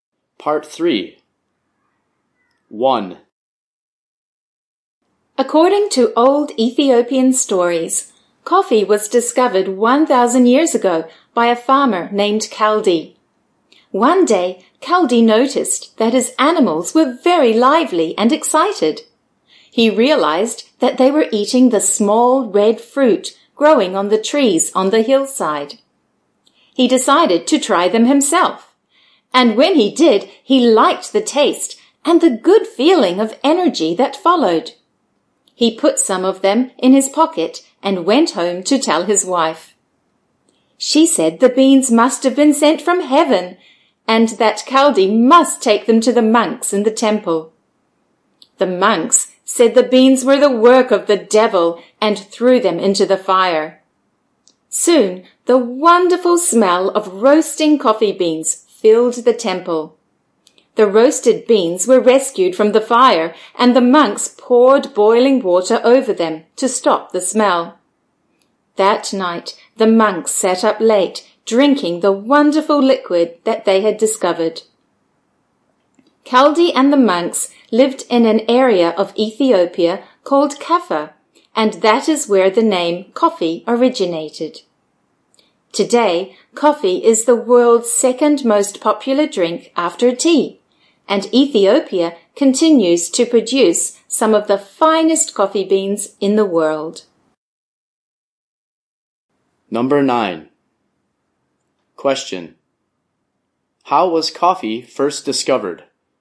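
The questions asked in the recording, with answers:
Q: How was coffee first discovered?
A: A farmer, Kaldi, saw his animals get lively after eating the red fruit from trees, and tried it himself.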